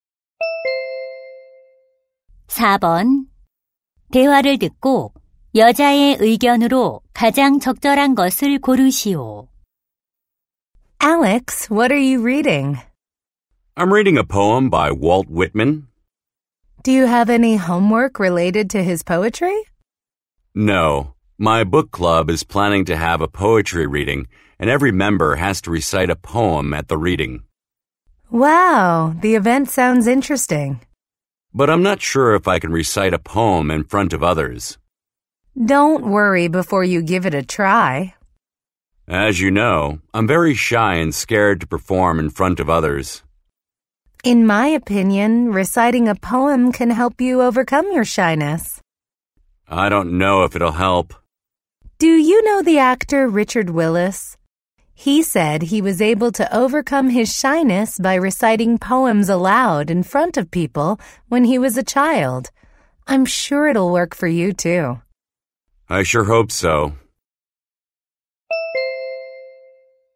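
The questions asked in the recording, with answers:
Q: 대화를 듣고 여자의 의견으로 가장 적절한 것을 고르시오.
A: 시 낭송은 수줍음 극복에 도움이 된다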